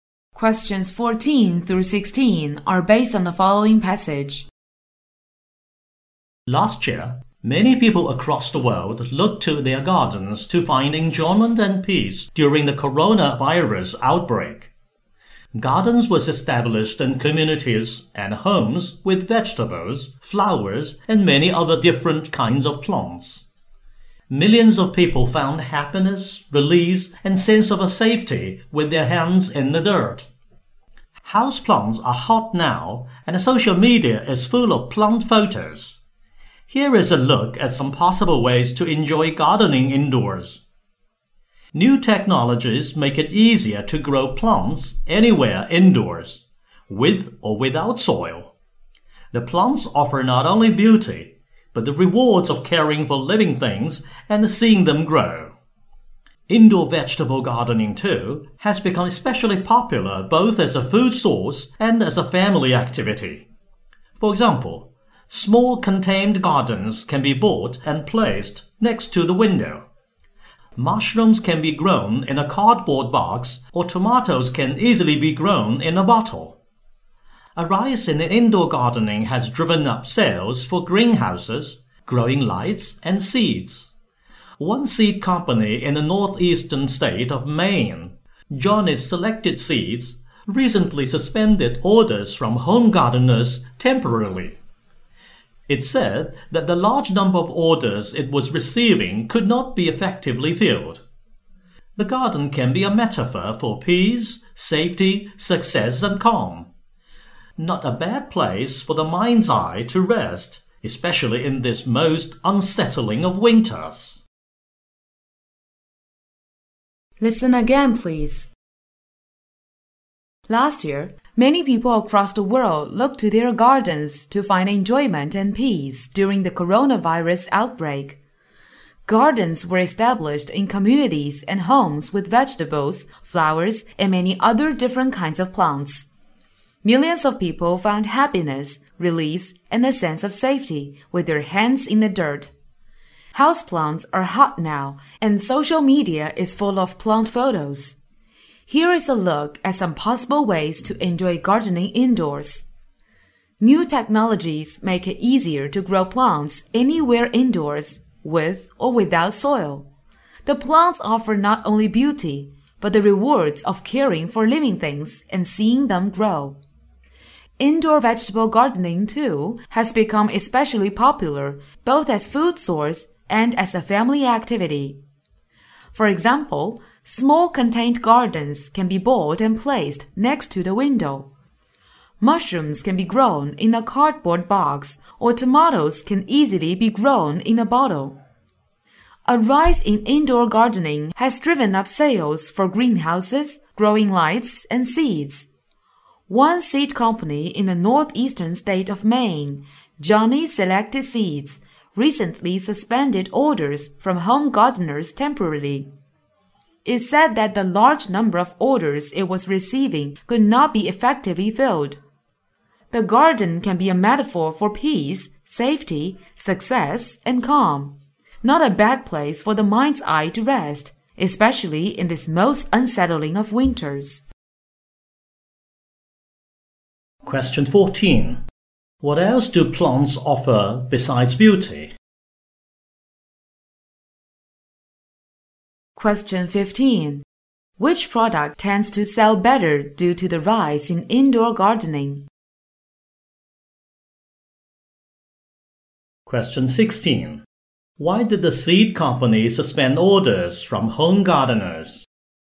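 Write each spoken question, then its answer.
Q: What else do plants offer besides beauty?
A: The rewards of caring for living things and seeing them grow

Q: Which product tends to sell better due to the rise in indoor gardening?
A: Greenhouses, growing lights and seeds

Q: Why did the seed company suspend orders from home gardeners?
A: It couldn't effectively fill the large number of orders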